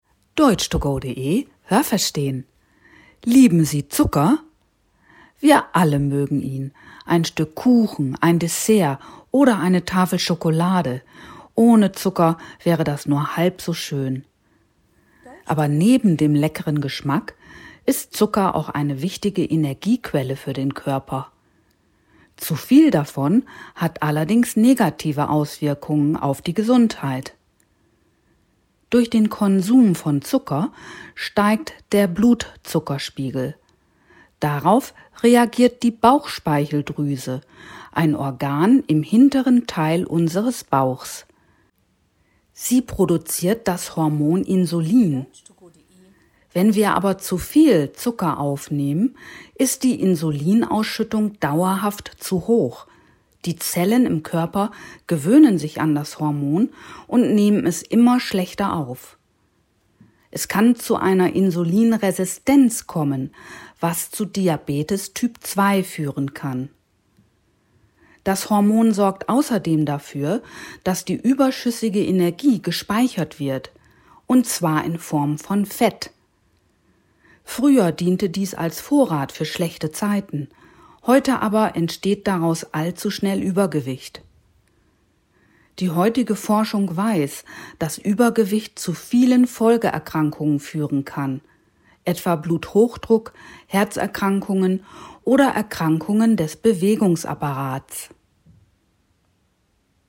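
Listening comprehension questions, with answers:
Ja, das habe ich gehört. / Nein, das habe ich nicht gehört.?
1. Zucker ist eine wichtige Energiequelle für den Körper. Haben Sie das gehört? Stimmt diese Aussage?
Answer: Ja, das habe ich gehört.

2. Wenn wir Zucker konsumieren, sinkt der Blutzuckerspiegel. Haben Sie das gehört? Stimmt diese Aussage?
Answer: Nein, das habe ich nicht gehört.

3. Die Bauchspeicheldrüse produziert das Hormon Thyroxin. Haben Sie das gehört? Stimmt diese Aussage?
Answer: Nein, das habe ich nicht gehört.

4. Nehmen wir zu viel Zucker zu uns, ist die Insulinausschüttung dauerhaft zu niedrig. Haben Sie das gehört? Stimmt diese Aussage?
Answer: Nein, das habe ich nicht gehört.

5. Eine Insulinresistenz kann zu Typ-2-Diabetes führen. Haben Sie das gehört? Stimmt diese Aussage?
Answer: Ja, das habe ich gehört.

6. Früher diente überschüssiges Fett als Reserve für schlechte Zeiten. 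Haben Sie das gehört? Stimmt diese Aussage?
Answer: Ja, das habe ich gehört.

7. Übergewicht kann zu Folgeerkrankungen wie Bluthochdruck oder Herzerkrankungen führen. Haben Sie das gehört? Stimmt diese Aussage?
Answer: Ja, das habe ich gehört.

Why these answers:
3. Das dort produzierte Hormon heißt Insulin.

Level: B2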